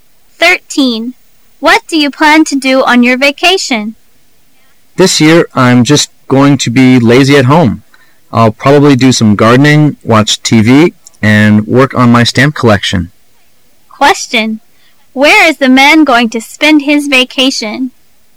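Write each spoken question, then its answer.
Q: Where is the man going to spend his vacation?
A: At home

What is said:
[解析] W: What do you plan to do on your vacation? M: This year I'm just going to be lazy at home. I'll probably do some gardening, watch TV, and work on my stamp collection. Q: Where is the man going to spend his vacation?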